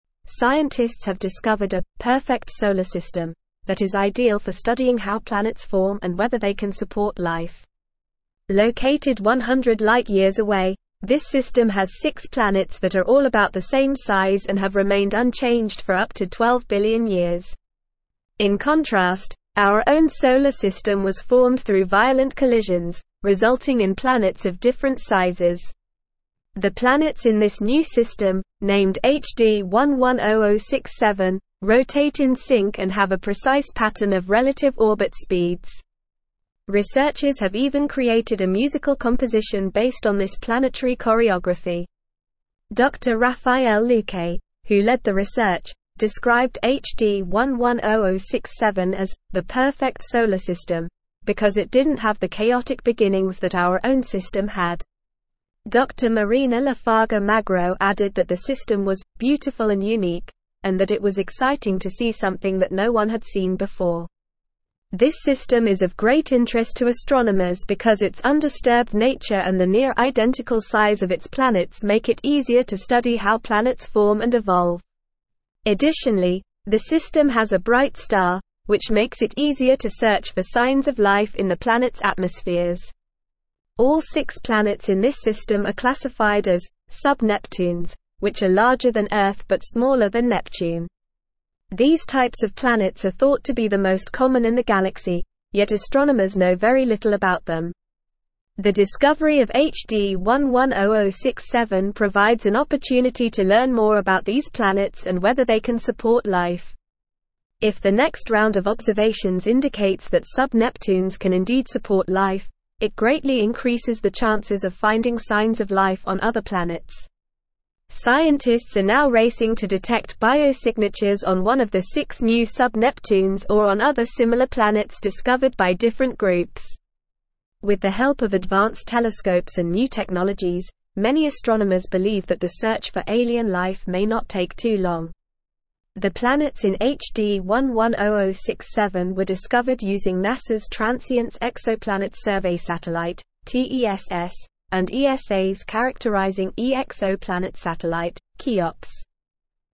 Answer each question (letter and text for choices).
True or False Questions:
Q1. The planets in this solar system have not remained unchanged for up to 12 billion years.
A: False

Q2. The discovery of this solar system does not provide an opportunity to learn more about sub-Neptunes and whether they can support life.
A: False

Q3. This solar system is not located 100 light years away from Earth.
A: False

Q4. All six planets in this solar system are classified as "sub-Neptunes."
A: True

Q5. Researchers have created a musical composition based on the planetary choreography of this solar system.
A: True

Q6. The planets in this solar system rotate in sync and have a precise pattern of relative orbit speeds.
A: True

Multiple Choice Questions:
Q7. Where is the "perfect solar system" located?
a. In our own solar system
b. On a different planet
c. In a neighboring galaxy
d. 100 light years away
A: d. 100 light years away

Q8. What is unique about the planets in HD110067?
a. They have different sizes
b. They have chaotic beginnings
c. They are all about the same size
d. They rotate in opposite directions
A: c. They are all about the same size

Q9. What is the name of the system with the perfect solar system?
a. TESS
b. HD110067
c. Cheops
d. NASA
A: b. HD110067

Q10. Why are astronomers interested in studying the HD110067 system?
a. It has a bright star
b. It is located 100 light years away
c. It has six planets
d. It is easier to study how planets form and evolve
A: d. It is easier to study how planets form and evolve

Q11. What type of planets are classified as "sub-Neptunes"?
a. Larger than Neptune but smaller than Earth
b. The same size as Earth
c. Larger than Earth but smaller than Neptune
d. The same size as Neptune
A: c. Larger than Earth but smaller than Neptune

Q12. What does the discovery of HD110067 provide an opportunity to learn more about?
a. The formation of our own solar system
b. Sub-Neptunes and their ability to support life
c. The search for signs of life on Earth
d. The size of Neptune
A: b. Sub-Neptunes and their ability to support life

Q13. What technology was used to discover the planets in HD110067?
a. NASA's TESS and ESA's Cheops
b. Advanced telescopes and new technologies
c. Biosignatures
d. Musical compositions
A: a. NASA's TESS and ESA's Cheops

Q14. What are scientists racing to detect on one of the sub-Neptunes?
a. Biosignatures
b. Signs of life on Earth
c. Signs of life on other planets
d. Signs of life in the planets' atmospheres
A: a. Biosignatures

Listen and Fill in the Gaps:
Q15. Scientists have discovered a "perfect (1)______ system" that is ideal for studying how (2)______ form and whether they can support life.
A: solar

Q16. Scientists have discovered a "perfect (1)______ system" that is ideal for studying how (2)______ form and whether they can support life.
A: planets

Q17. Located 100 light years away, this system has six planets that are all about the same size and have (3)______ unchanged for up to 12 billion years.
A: remained

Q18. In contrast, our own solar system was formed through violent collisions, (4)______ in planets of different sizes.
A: resulting

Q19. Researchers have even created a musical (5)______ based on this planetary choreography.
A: composition

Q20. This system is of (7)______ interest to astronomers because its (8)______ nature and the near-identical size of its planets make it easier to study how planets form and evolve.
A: great

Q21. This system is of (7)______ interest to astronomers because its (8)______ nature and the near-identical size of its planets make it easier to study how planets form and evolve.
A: undisturbed

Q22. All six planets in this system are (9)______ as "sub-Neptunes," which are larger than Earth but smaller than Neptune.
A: classified

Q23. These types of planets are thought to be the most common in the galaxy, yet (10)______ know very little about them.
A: astronomers

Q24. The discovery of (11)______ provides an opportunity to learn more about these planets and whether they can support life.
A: HD110067

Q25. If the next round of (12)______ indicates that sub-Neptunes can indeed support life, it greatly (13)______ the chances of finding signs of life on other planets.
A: observations

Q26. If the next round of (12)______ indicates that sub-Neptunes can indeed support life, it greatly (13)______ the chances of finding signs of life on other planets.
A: increases

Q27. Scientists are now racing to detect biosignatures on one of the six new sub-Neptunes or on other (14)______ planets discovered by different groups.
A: similar

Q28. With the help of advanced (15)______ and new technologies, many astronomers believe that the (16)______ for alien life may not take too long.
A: telescopes

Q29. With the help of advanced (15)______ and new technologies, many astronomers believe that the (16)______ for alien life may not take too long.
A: search

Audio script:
Scientists have discovered a "perfect solar system" that is ideal for studying how planets form and whether they can support life. Located 100 light years away, this system has six planets that are all about the same size and have remained unchanged for up to 12 billion years. In contrast, our own solar system was formed through violent collisions, resulting in planets of different sizes. The planets in this new system, named HD110067, rotate in sync and have a precise pattern of relative orbit speeds. Researchers have even created a musical composition based on this planetary choreography.
Dr Rafael Luque, who led the research, described HD110067 as "the perfect solar system" because it didn't have the chaotic beginnings that our own system had. Dr Marina Lafarga-Magro added that the system was "beautiful and unique" and that it was exciting to see something that no one had seen before. This system is of great interest to astronomers because its undisturbed nature and the near-identical size of its planets make it easier to study how planets form and evolve. Additionally, the system has a bright star, which makes it easier to search for signs of life in the planets' atmospheres.
All six planets in this system are classified as "sub-Neptunes," which are larger than Earth but smaller than Neptune. These types of planets are thought to be the most common in the galaxy, yet astronomers know very little about them. The discovery of HD110067 provides an opportunity to learn more about these planets and whether they can support life. If the next round of observations indicates that sub-Neptunes can indeed support life, it greatly increases the chances of finding signs of life on other planets.
Scientists are now racing to detect biosignatures on one of the six new sub-Neptunes or on other similar planets discovered by different groups. With the help of advanced telescopes and new technologies, many astronomers believe that the search for alien life may not take too long.

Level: Level 4